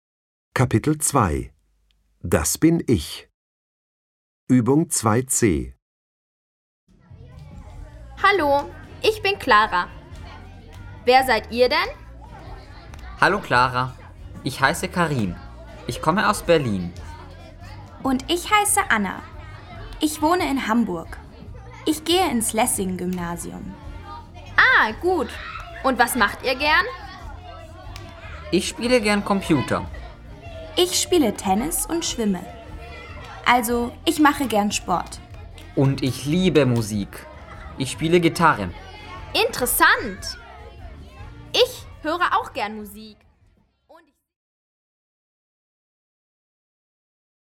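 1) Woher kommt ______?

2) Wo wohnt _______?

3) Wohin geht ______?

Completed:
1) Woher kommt Karim?
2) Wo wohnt Anna?
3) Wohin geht Anna?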